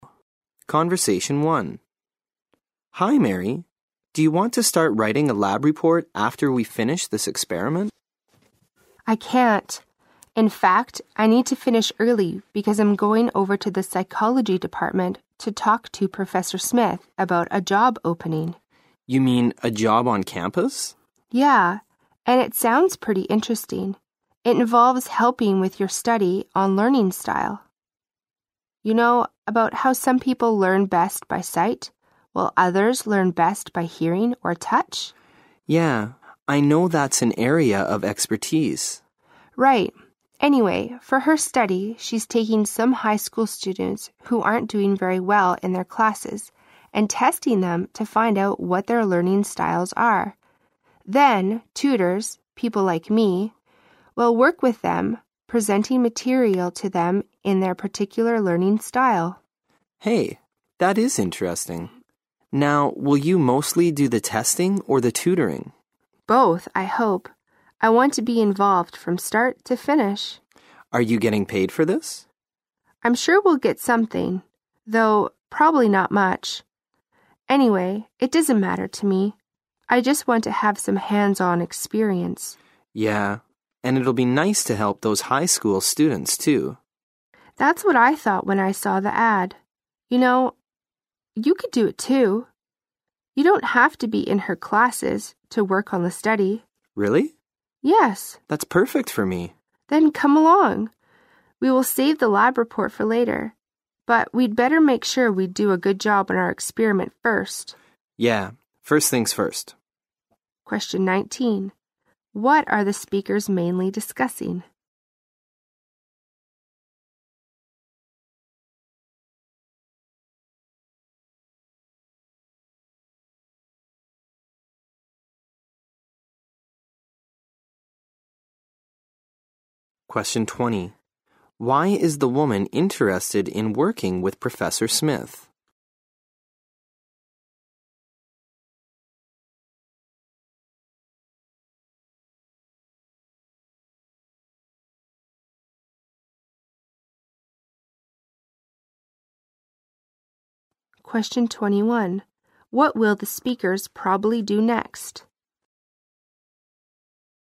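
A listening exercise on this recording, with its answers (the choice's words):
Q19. 19.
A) A chemistry assignment.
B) A study their chemistry professor did.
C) A course the woman is taking.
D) A job possibility.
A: A job possibility.

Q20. 20.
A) She wants to quit her job in the chemistry lab.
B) She wants to get practical experience.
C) She's interested in becoming a psychology major.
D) She wants to earn extra money.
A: She wants to get practical experience.

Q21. 21.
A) Write their lab reports.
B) Find out Professor Smith's schedule.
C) Interview some high school students.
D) Finish their chemistry experiment.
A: Finish their chemistry experiment.

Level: 六级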